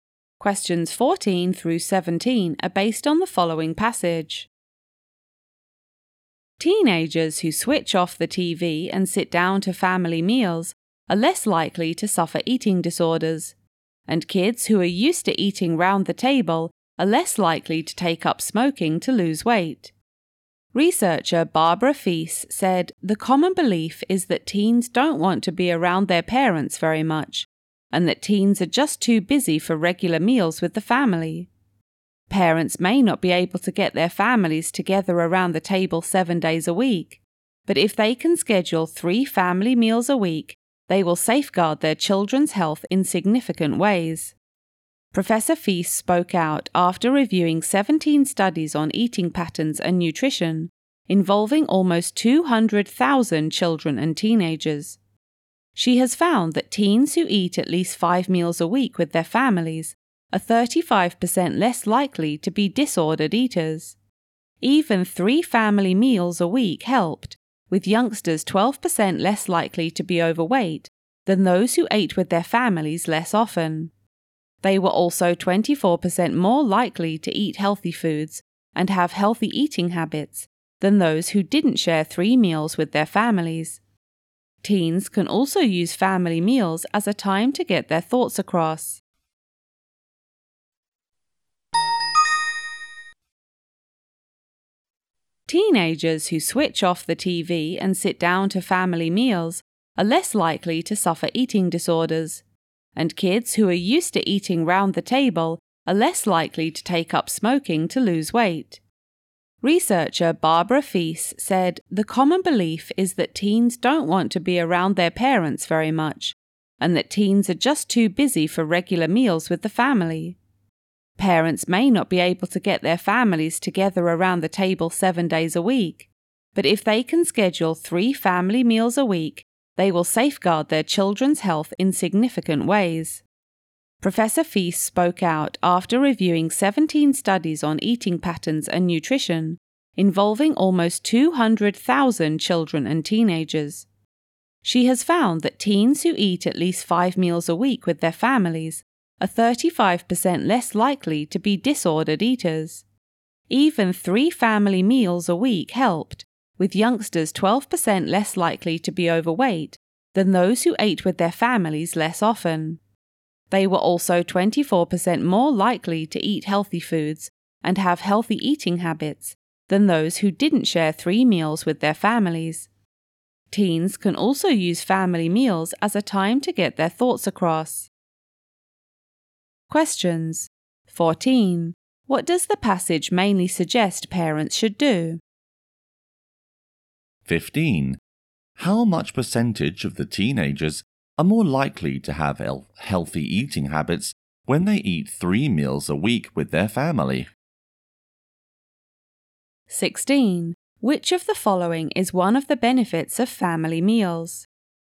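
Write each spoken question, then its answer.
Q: What does the passage mainly suggest parents should do?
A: Have regular family meals with their children

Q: How much percentage of the teenagers are more likely to have healthy eating habits when they eat 3 meals a week with their family?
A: 24%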